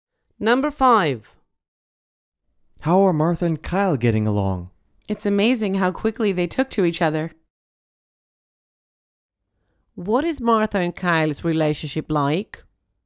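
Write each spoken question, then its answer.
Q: What is Martha and Kyle's relationship like?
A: They got along well very quickly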